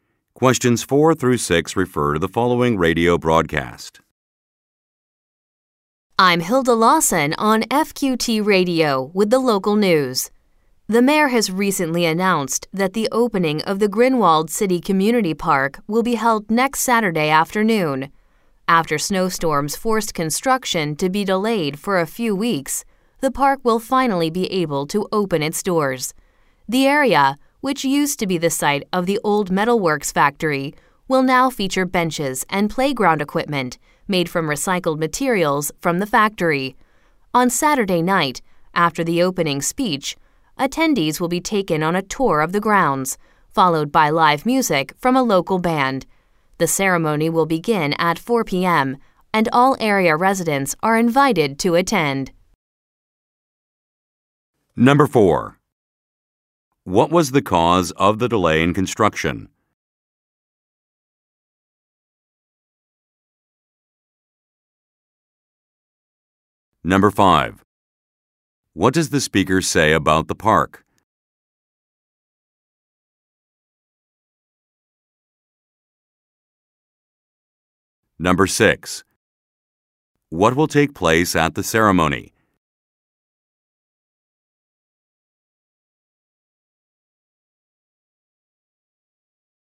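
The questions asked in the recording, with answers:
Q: What was the cause of the delay in construction?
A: Snowstorms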